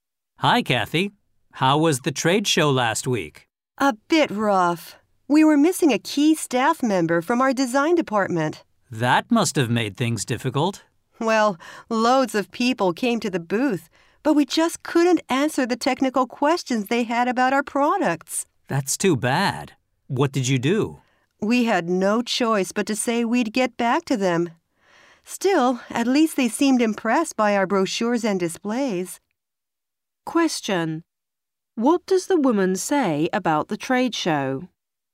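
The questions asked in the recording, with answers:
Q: What does the woman say about the trade show?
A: It went badly: a key design staff member was missing, so they couldn't answer visitors' technical questions about their products.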